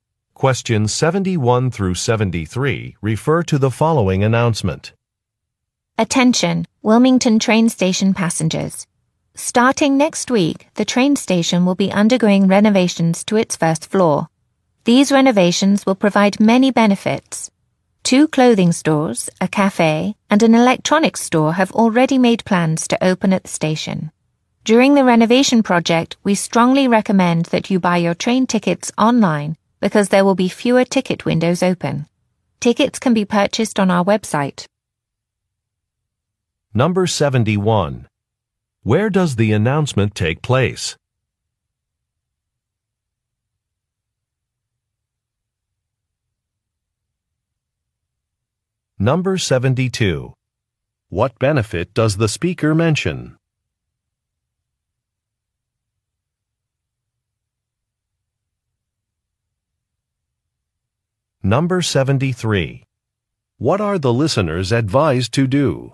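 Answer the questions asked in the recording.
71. At a train station
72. New stores and a cafe will open at the station
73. Buy train tickets online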